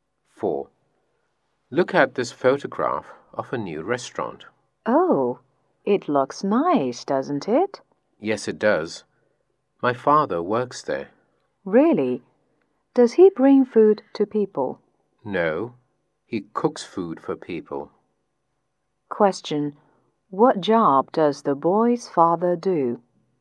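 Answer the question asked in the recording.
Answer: He is a cook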